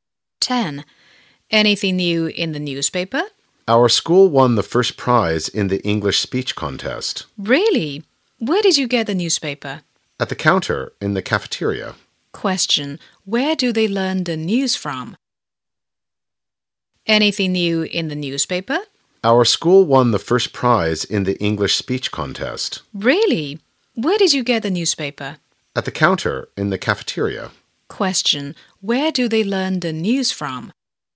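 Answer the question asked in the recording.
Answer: From a newspaper they got at the cafeteria counter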